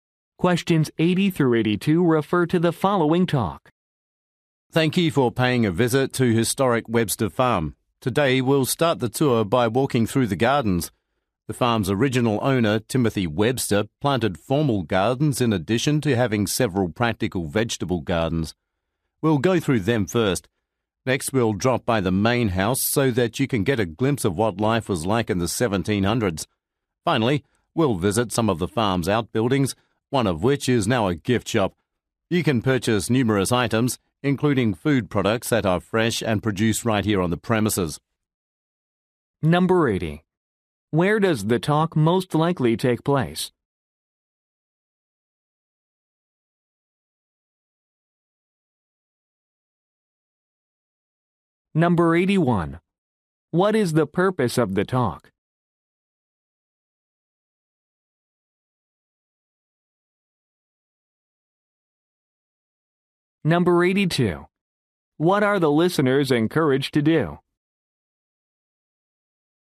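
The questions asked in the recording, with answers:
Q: Where does the talk most likely take place?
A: At a historic farm

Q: What is the purpose of the talk?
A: To describe the tour plan

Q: What are the listeners encouraged to do?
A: Buy fresh food products at the gift shop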